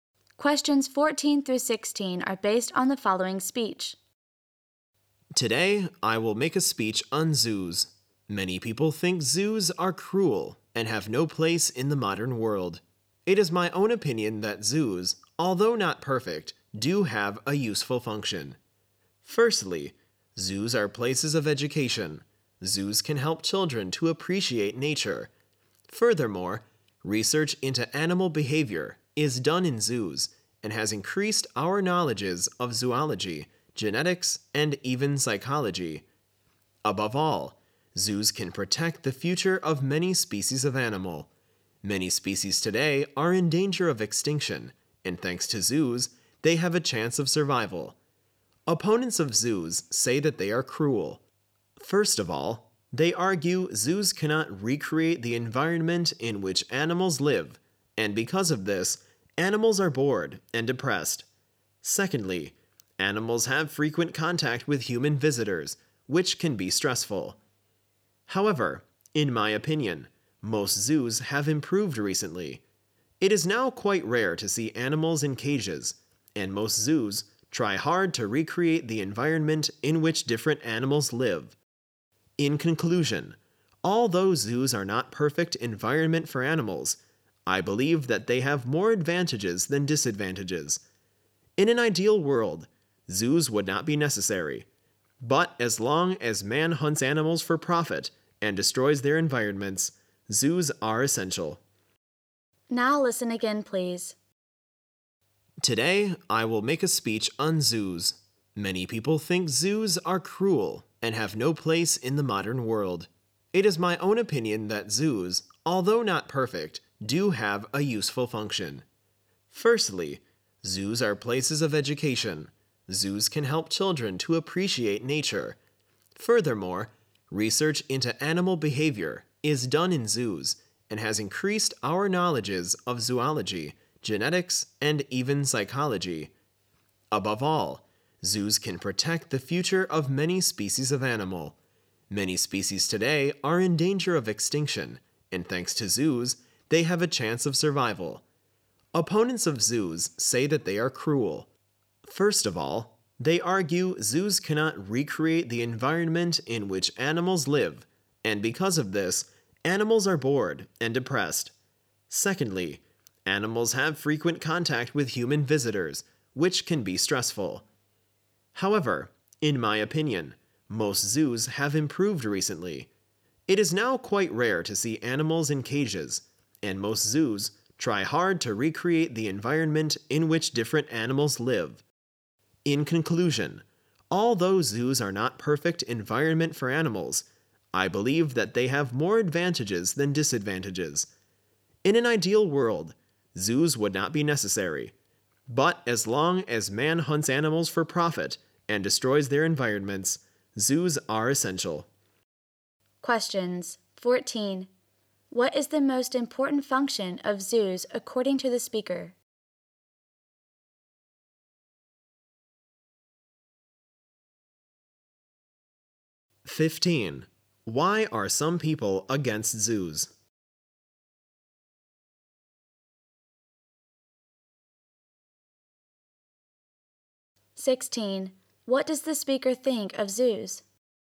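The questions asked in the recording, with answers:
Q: What is the most important function of zoos according to the speaker?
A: Protecting the future of endangered species

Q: Why are some people against zoos?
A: They think zoos are cruel to animals

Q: What does the speaker think of zoos?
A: They have more advantages than disadvantages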